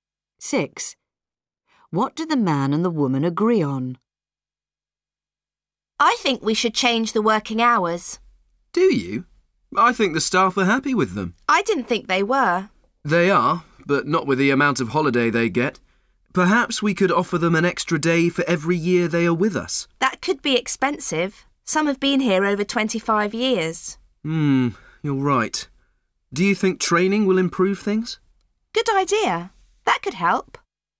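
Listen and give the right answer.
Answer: That training could improve things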